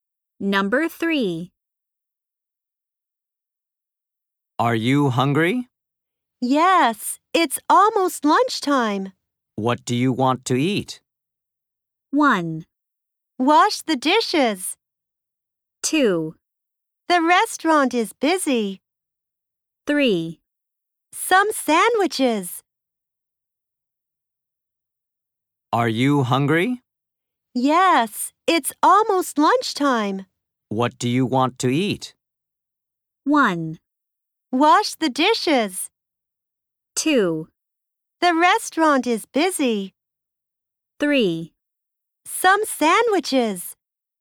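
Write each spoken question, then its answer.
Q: What do you want to eat?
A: 3: Some sandwiches.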